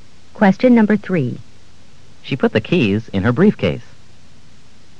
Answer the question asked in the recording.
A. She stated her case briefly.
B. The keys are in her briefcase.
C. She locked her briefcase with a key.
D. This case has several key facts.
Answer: B. The keys are in her briefcase.

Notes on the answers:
She put the keys in her briefcase.